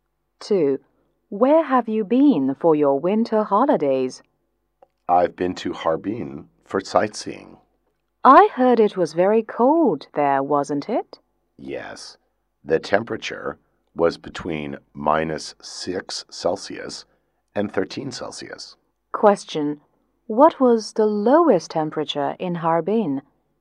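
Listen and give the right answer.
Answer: -6 degrees Celsius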